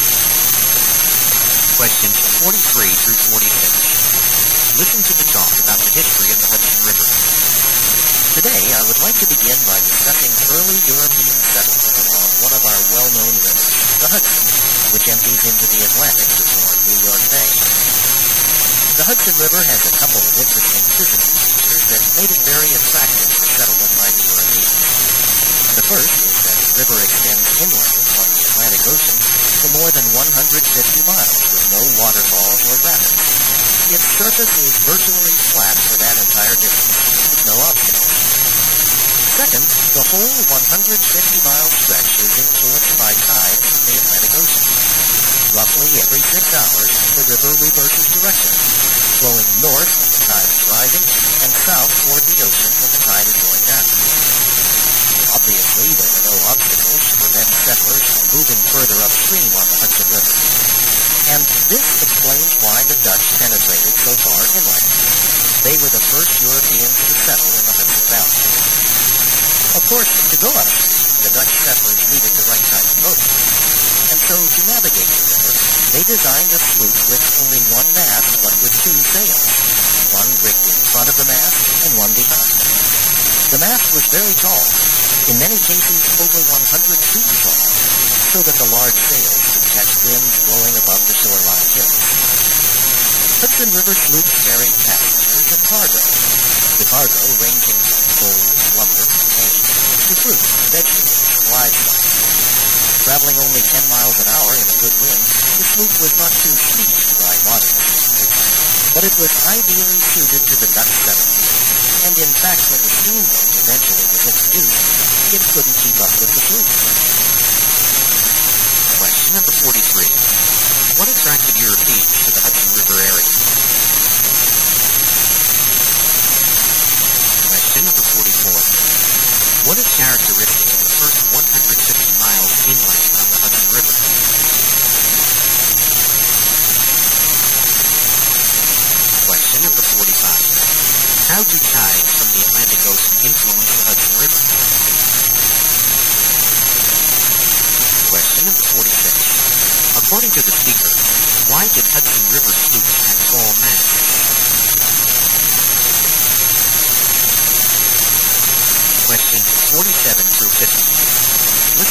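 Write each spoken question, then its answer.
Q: What attracted Europeans to the Hudson River area?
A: Its physical features: no obstacles for 150 miles, and tides

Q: What is characteristic of the first 150 miles inland on the Hudson River?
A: There are no waterfalls or rapids; the surface is flat

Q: How do tides from the Atlantic Ocean influence the Hudson River?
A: They make the river reverse direction about every 6 hours

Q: According to the speaker, why did Hudson River sloops have tall masts?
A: So the large sails could catch winds blowing above the shoreline hills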